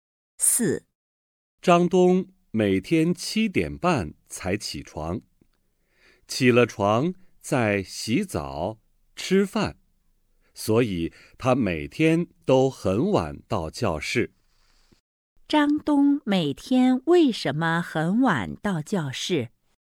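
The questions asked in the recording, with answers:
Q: 张东每天为什么很晚到教室?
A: 起床晚,起了床还要洗澡吃饭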